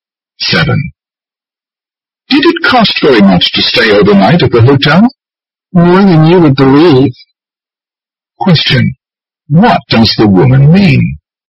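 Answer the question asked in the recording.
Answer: The hotel was very expensive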